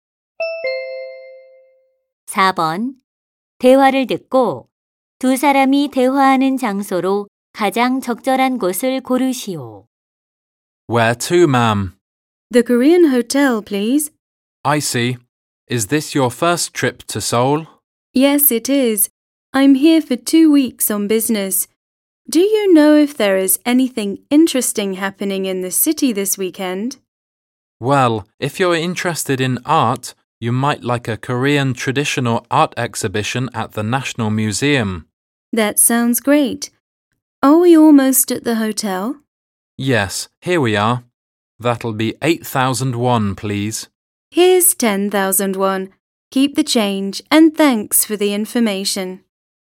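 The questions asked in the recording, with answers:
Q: 대화를 듣고 두 사람이 대화하는 장소로 가장 적절한 곳을 고르시오.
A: 택시 안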